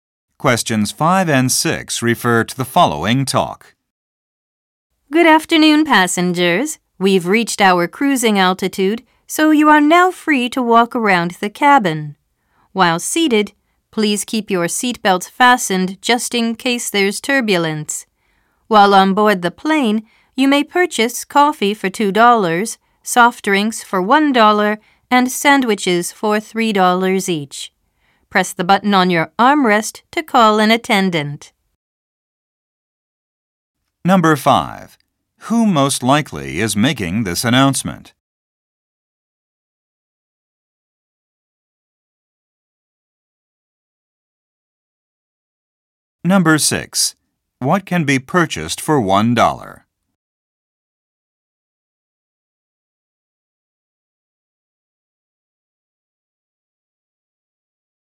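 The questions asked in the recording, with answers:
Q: What can be purchased for $1?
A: Soft drinks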